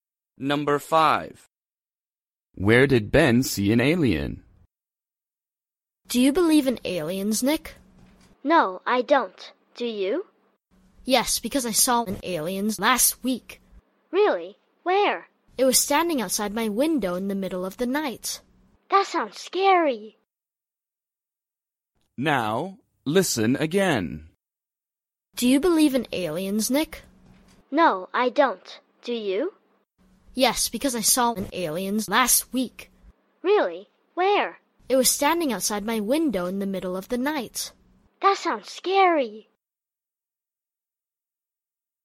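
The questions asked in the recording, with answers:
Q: Where did Ben see an alien?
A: outside his window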